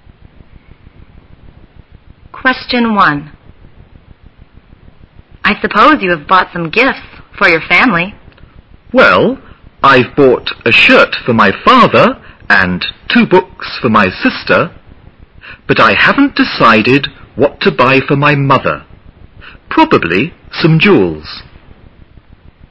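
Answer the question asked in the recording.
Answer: His sister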